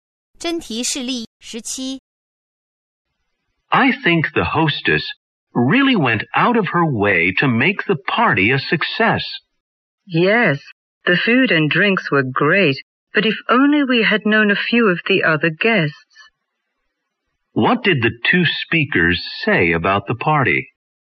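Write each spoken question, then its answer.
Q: What did the two speakers say about the party?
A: The food and drinks were great, but they knew few of the other guests.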